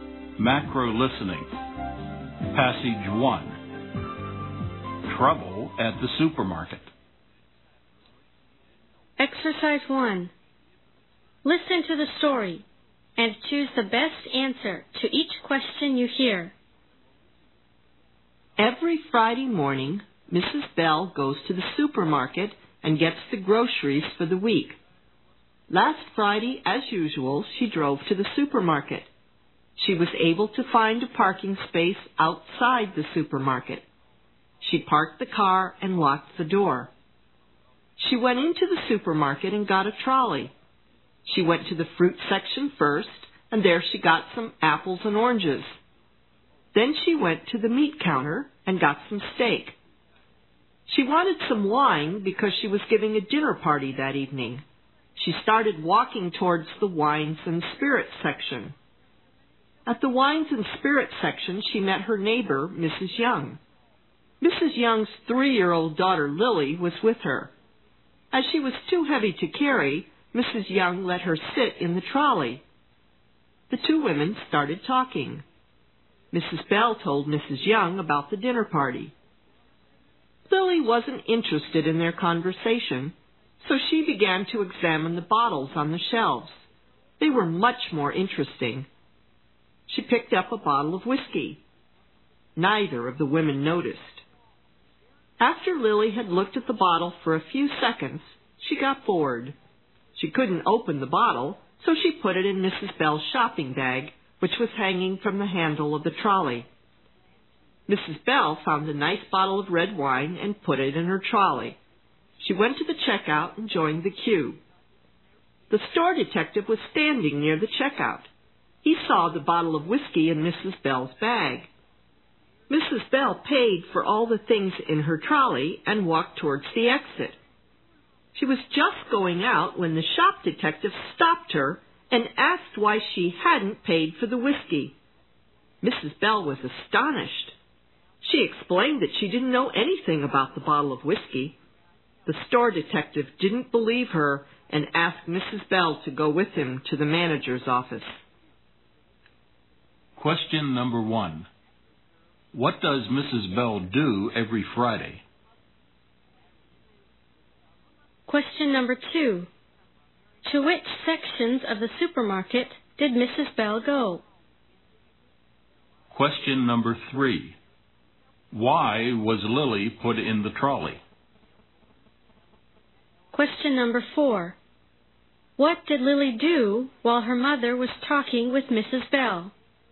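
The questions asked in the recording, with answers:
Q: What does Mrs.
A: She goes to the supermarket and gets the groceries for the week.

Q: To which sections of the supermarket did Mrs.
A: The fruit section, the meat counter and the wines and spirits section

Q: Why was Lily put in the trolley?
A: She was too heavy to carry.

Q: What did Lily do while her mother was talking with Mrs.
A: She looked at the bottles and put a bottle of whiskey in Mrs. Bell's bag.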